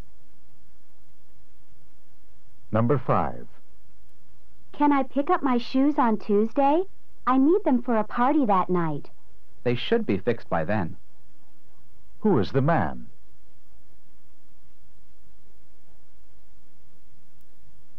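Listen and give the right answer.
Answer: A shoe repairman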